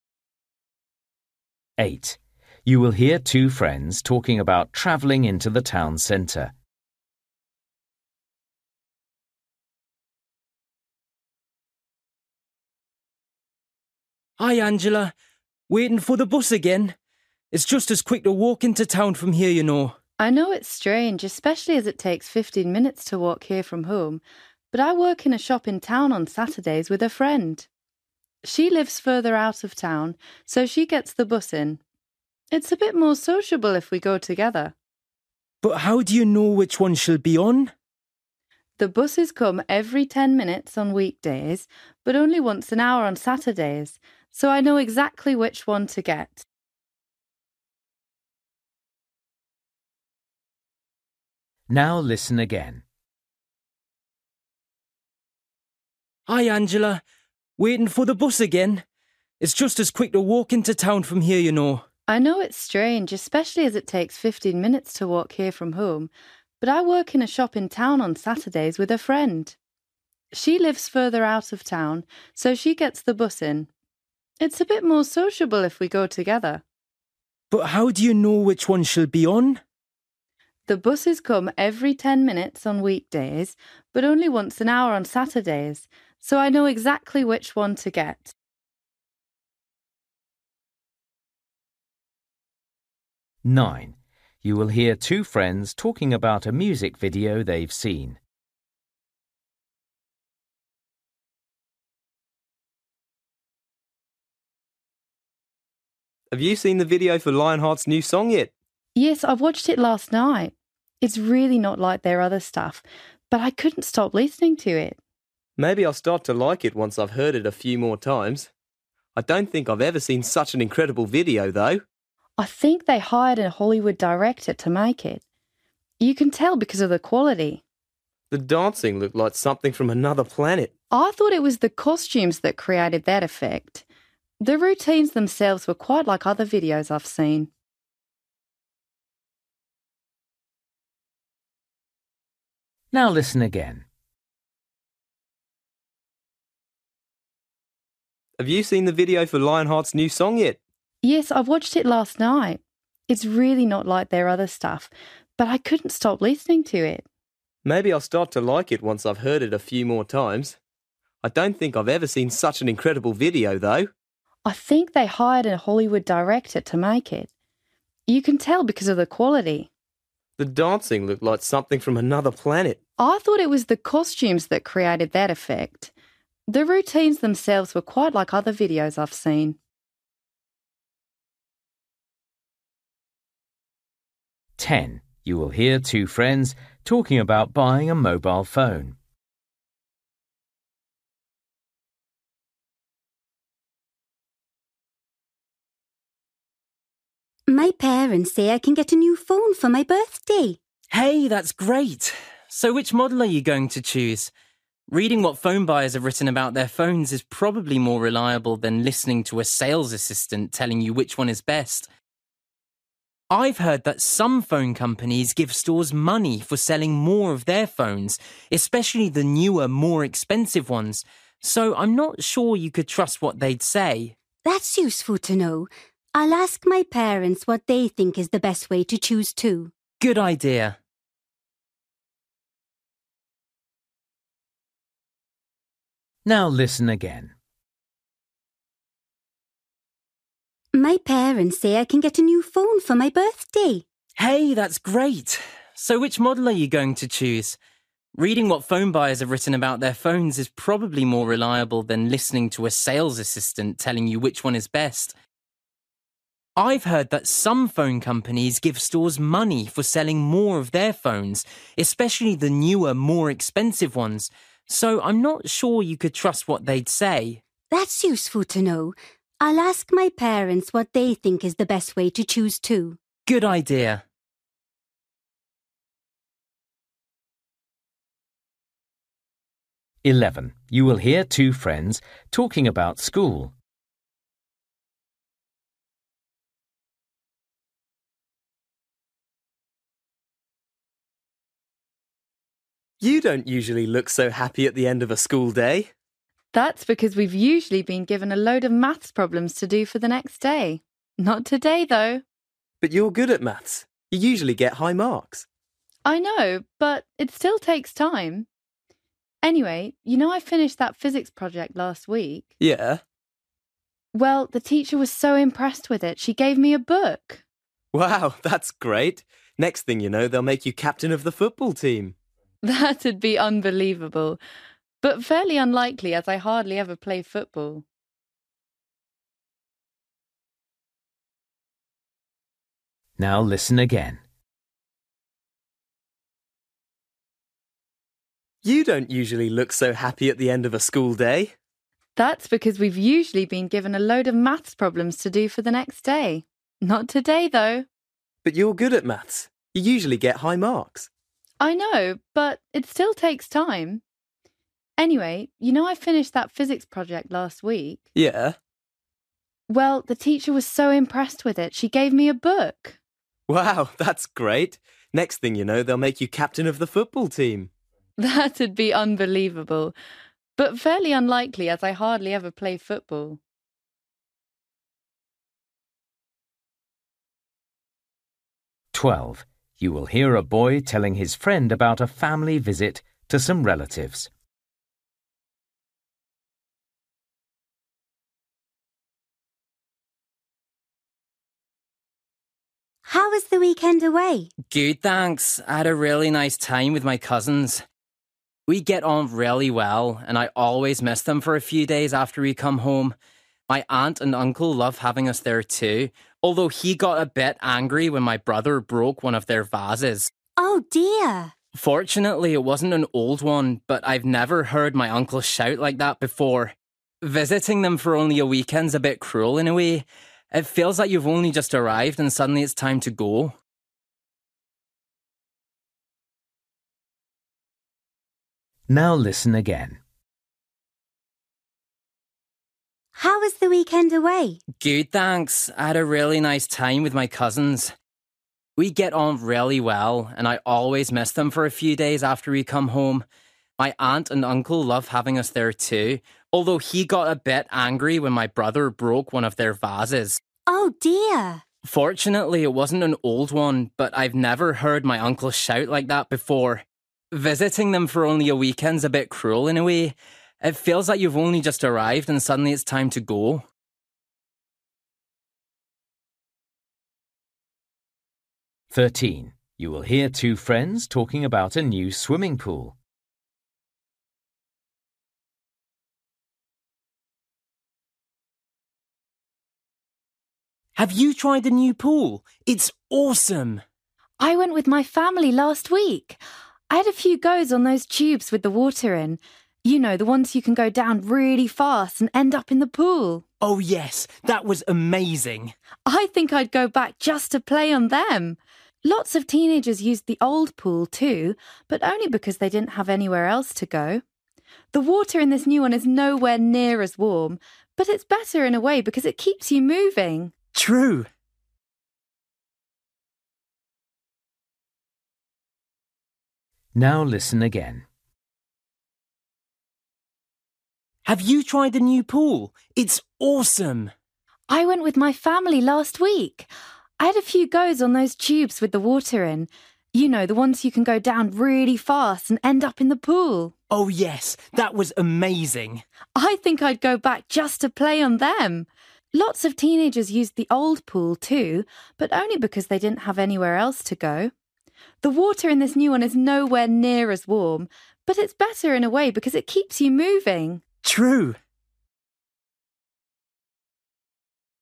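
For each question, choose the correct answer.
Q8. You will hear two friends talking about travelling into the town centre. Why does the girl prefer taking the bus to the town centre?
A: Because she can travel with her friend, who works in the same shop.

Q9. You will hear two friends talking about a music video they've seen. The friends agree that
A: the video was of very high quality.

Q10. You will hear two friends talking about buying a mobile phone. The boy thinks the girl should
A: read what phone buyers have written rather than trust sales assistants.

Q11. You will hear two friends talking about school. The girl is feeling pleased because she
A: was given a book by her teacher for her physics project.

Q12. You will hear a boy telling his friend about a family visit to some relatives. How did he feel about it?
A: He enjoyed it but felt the visit was too short.

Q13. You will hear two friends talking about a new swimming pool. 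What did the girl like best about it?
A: The water tubes (slides) that go down fast into the pool.

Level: Luyện nghe trình độ B1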